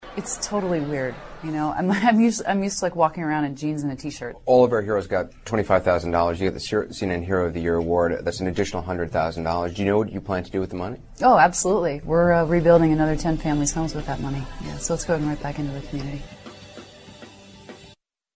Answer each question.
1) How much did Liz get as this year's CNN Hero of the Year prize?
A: 125,000 dollars.

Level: C类